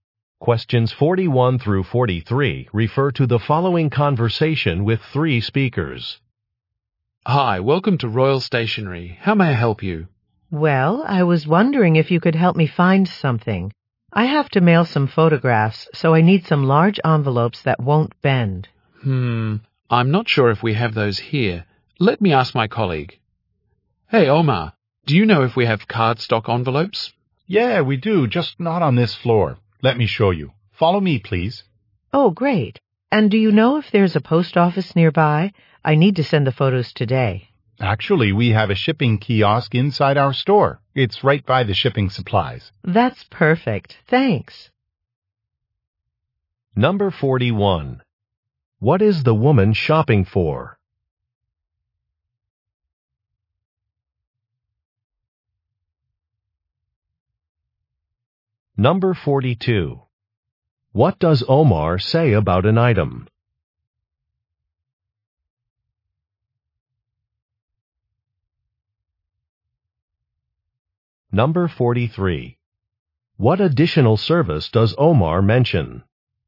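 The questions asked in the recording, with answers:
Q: What is the woman shopping for?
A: Large envelopes that won't bend

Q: What does Omar say about an item?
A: It is on a different floor

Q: What additional service does Omar mention?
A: A shipping kiosk in the store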